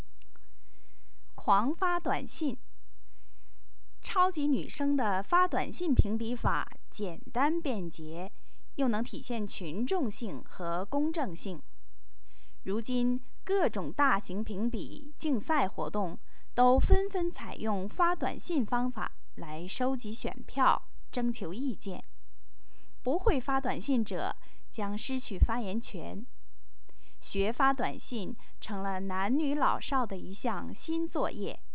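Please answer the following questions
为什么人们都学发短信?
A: 因为各种评比竞赛活动都用发短信收集选票、征求意见,不会发短信就失去发言权

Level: 3rd Year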